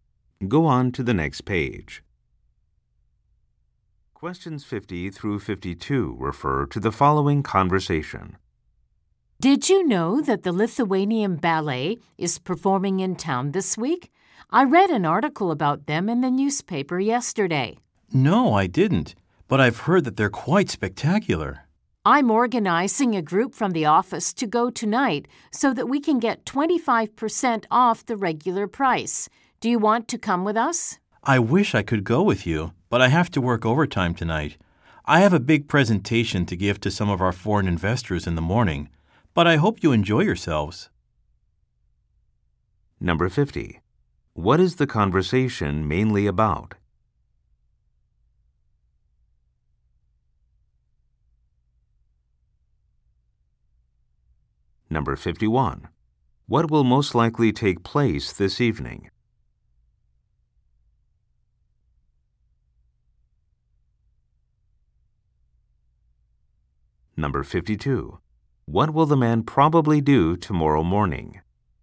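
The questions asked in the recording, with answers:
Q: What is the conversation mainly about?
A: A ballet performance

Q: What will most likely take place this evening?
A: A group from the office will go to the ballet

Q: What will the man probably do tomorrow morning?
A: Give a presentation to foreign investors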